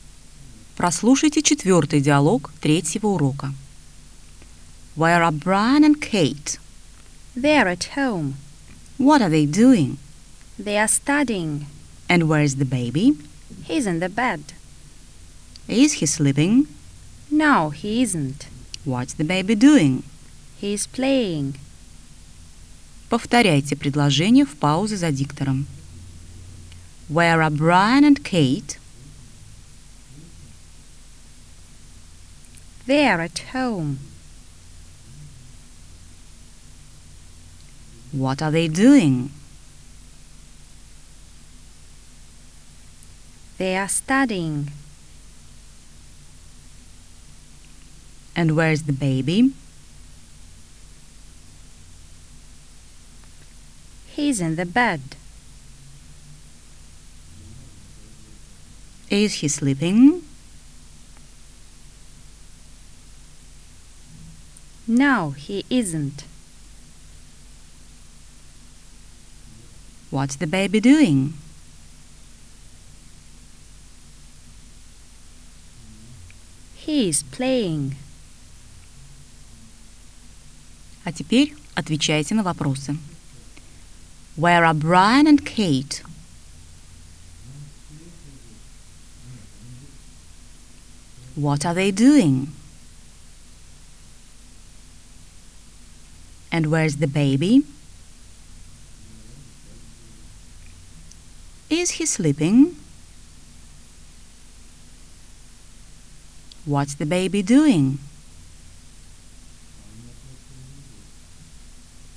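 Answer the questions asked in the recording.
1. They're at home.
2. They are studying.
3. He's in the bed.
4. No, he isn't.
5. He's playing.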